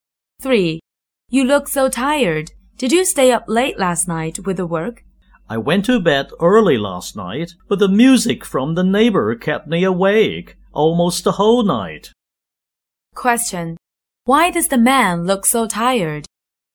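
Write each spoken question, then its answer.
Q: Why does the man look so tired?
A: The neighbor's music kept him awake almost all night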